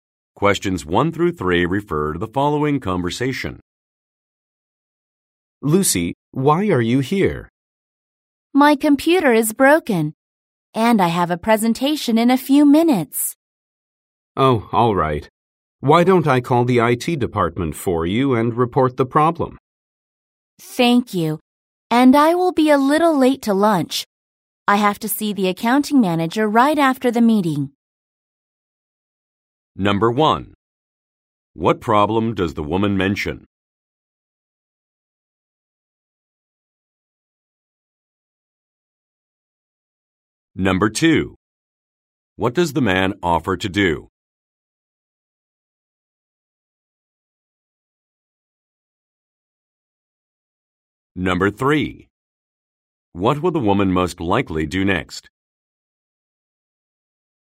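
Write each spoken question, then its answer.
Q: What problem does the woman mention?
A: Her computer is broken.

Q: What does the man offer to do?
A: Call the IT department to report the problem.

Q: What will the woman most likely do next?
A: Give a presentation.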